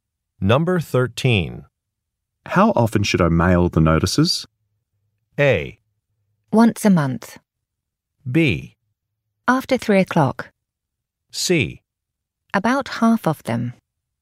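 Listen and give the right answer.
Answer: A: Once a month.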